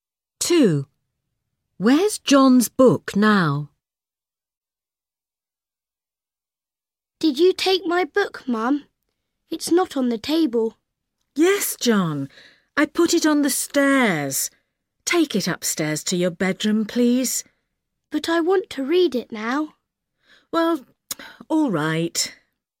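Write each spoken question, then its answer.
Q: Where's John's book now?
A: on the stairs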